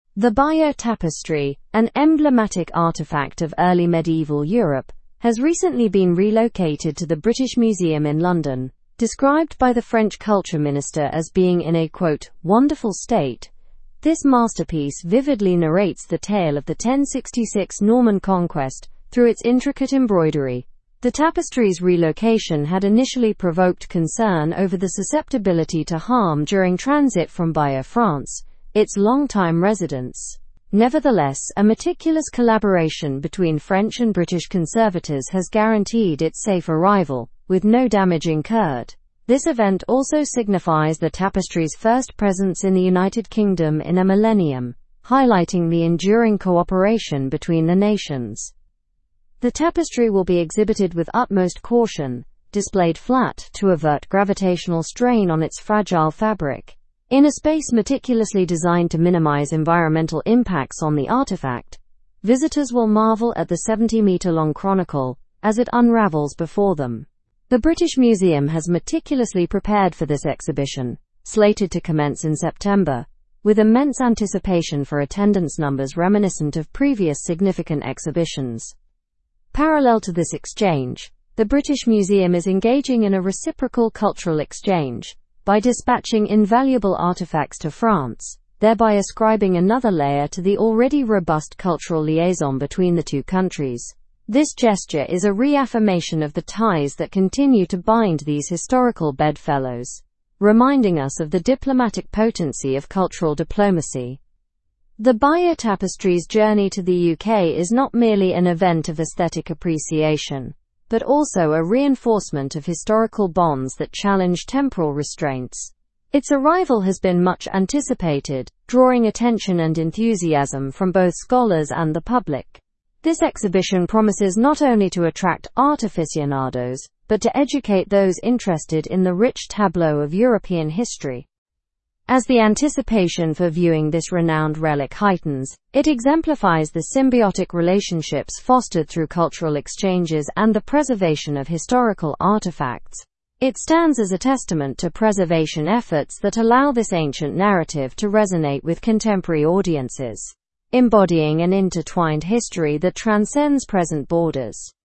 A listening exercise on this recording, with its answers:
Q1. What is the Bayeux Tapestry?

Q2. Where has the tapestry been relocated to?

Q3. Why were there initial concerns about moving the tapestry?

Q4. How did the conservators ensure the tapestry's safe transport?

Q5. How is the tapestry being displayed to prevent strain?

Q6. What activities are strengthening the bond between France and Britain?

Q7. What does the journey of the tapestry symbolize?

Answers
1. The Bayeux Tapestry is an emblematic artifact of early medieval Europe that narrates the 1066 Norman Conquest.
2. The tapestry has been relocated to the British Museum in London.
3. There were initial concerns about the susceptibility to harm during its transportation from Bayeux, France.
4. French and British conservators collaborated to ensure its safe arrival without damage.
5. The tapestry will be shown flat to prevent gravitational strain on its delicate fabric.
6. The cultural exchange involving both countries sending artifacts to one another is strengthening the bond.
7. The journey of the tapestry symbolizes the reinforcement of historical bonds that defy temporal constraints.

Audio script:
The Bayeux Tapestry, an emblematic artifact of early medieval Europe, has recently been relocated to the British Museum in London. Described by the French culture minister as being in a "wonderful state", this masterpiece vividly narrates the tale of the 1066 Norman Conquest through its intricate embroidery. The tapestry's relocation had initially provoked concern over the susceptibility to harm during transit from Bayeux, France, its long-time residence. Nevertheless, a meticulous collaboration between French and British conservators has guaranteed its safe arrival with no damage incurred. This event also signifies the tapestry's first presence in the United Kingdom in a millennium, highlighting the enduring cooperation between the nations.
The tapestry will be exhibited with utmost caution, displayed flat to avert gravitational strain on its fragile fabric. In a space meticulously designed to minimize environmental impacts on the artifact, visitors will marvel at the 70-meter-long chronicle as it unravels before them. The British Museum has meticulously prepared for this exhibition, slated to commence in September, with immense anticipation for attendance numbers reminiscent of previous significant exhibitions.
Parallel to this exchange, the British Museum is engaging in a reciprocal cultural exchange by dispatching invaluable artifacts to France, thereby ascribing another layer to the already robust cultural liaison between the two countries. This gesture is a reaffirmation of the ties that continue to bind these historical bedfellows, reminding us of the diplomatic potency of cultural diplomacy.
The Bayeux Tapestry's journey to the UK is not merely an event of aesthetic appreciation but also a reinforcement of historical bonds that challenge temporal restraints. Its arrival has been much anticipated, drawing attention and enthusiasm from both scholars and the public.
has been much anticipated, drawing attention and enthusiasm from both scholars and the public. This exhibition promises not only to attract art aficionados but to educate those interested in the rich tableau of European ?. As the anticipation for viewing this renowned relic heightens, it exemplifies the symbiotic relationships fostered through cultural exchanges and the preservation of historical ?. It stands as a testament to preservation efforts that allow this ancient narrative to resonate with ? audiences, embodying an intertwined history that transcends present borders.

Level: Level 4